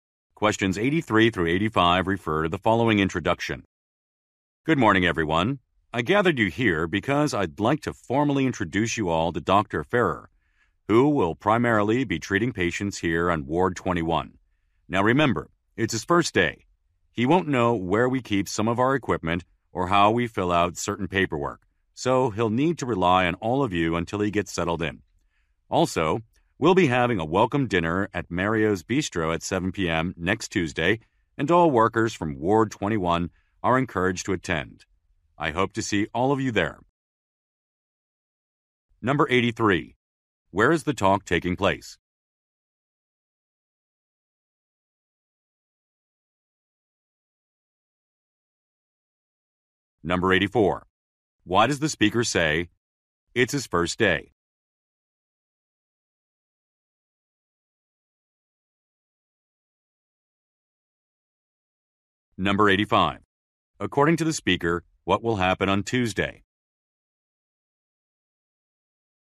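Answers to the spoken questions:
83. At a hospital
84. To ask staff to help him settle in
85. A welcome dinner at Mario's Bistro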